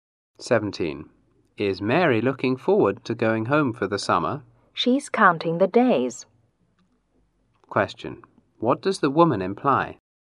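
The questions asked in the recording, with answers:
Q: What does the woman imply?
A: Mary is eagerly looking forward to going home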